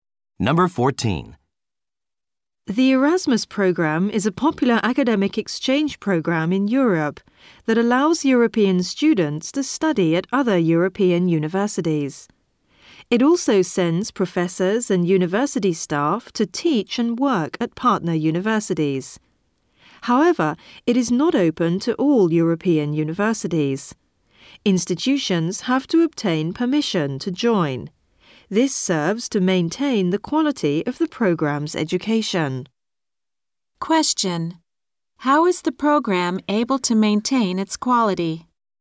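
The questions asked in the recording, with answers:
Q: How is the program able to maintain its quality?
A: Universities must get permission to join.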